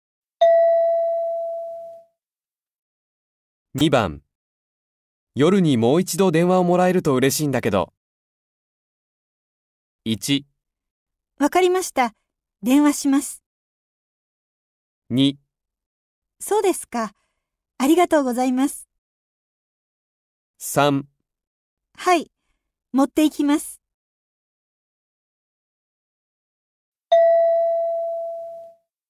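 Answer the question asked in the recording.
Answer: 1: わかりました。電話します。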